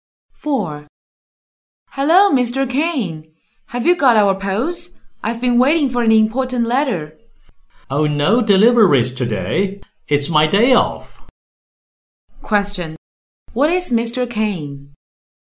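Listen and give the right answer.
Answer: A postman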